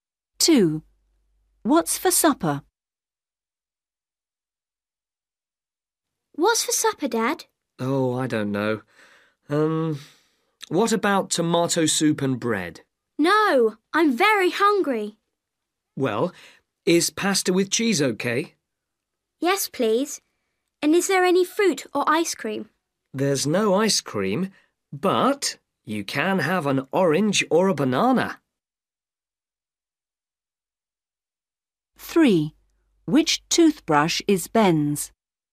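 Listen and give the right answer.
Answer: Pasta with cheese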